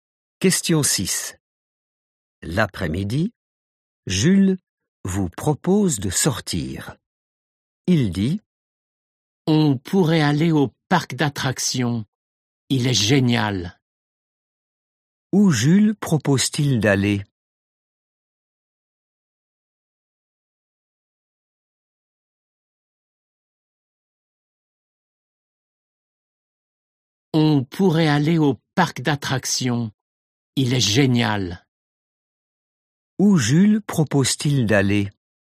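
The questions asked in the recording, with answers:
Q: Où Jules propose-t-il d'aller?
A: au parc d'attractions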